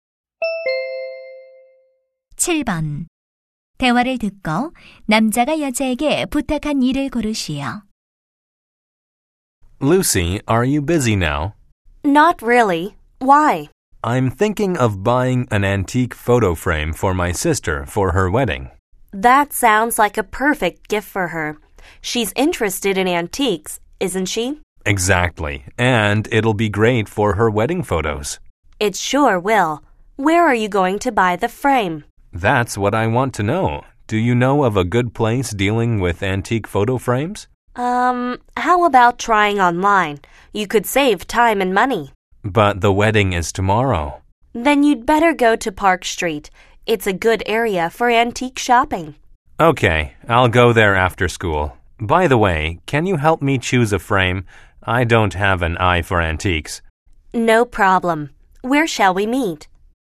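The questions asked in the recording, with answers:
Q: 대화를 듣고 남자가 여자에게 부탁한 일을 고르시오.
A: 골동품 액자 고르는 것 도와주기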